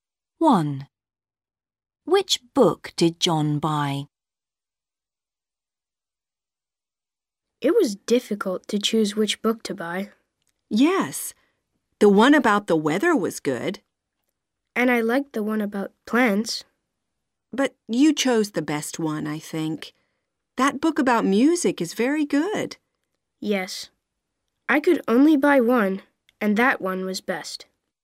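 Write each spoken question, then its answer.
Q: Which book did John buy?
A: the book about music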